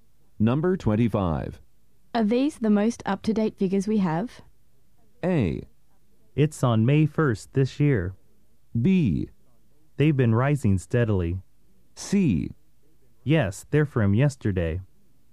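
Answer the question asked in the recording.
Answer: C: Yes, they're from yesterday.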